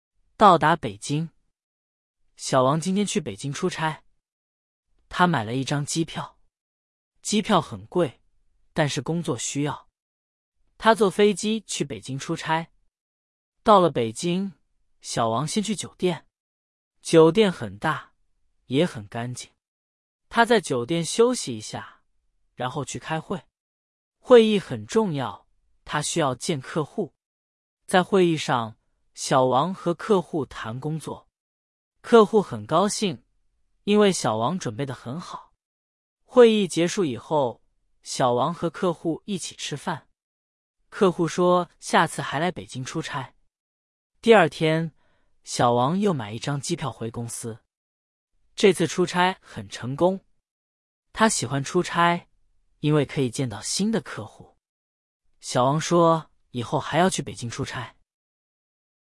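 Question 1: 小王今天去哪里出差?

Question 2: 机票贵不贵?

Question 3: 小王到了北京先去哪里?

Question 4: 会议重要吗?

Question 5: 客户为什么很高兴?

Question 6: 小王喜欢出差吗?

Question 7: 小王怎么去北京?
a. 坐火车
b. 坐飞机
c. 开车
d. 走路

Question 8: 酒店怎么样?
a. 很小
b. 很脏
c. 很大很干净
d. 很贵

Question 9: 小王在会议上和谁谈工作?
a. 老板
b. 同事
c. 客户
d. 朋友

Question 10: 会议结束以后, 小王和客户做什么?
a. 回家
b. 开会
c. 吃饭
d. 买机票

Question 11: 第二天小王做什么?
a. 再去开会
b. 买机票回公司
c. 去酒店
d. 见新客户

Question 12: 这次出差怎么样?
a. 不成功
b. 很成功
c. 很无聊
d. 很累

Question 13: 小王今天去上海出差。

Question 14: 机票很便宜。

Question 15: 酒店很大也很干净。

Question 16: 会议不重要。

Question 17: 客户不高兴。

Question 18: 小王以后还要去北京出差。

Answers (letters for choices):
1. 北京
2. 很贵
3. 酒店
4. 很重要
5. 因为小王准备得很好
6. 喜欢,因为可以见到新的客户
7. b
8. c
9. c
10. c
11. b
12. b
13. 错
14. 错
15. 对
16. 错
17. 错
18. 对

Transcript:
到达北京
小王今天去北京出差。他买了一张机票。机票很贵,但是工作需要。他坐飞机去北京出差。
到了北京,小王先去酒店。酒店很大,也很干净。他在酒店休息一下,然后去开会。会议很重要,他需要见客户。
在会议上,小王和客户谈工作。客户很高兴,因为小王准备得很好。会议结束以后,小王和客户一起吃饭。客户说下次还来北京出差。
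第二天,小王又买一张机票回公司。这次出差很成功。他喜欢出差,因为可以见到新的客户。小王说以后还要去北京出差。

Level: Beginner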